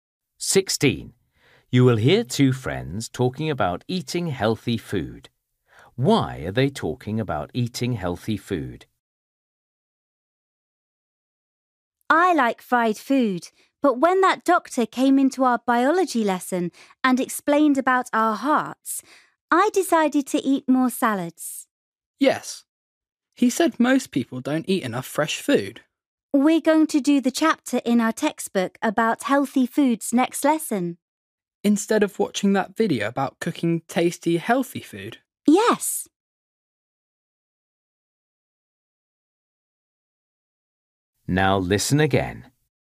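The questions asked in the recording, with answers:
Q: Why are they talking about eating healthy food?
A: A doctor came to their biology lesson and talked about it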